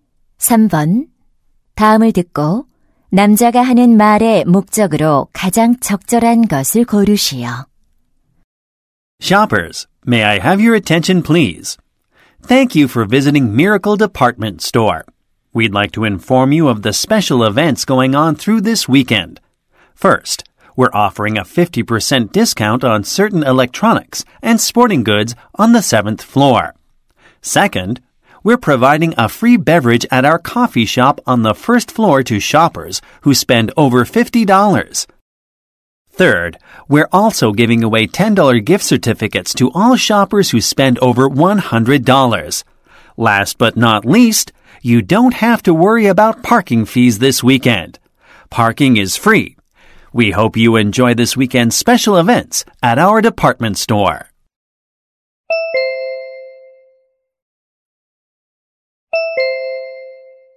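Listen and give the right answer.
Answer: 백화점의 주말 특별 행사를 안내하려고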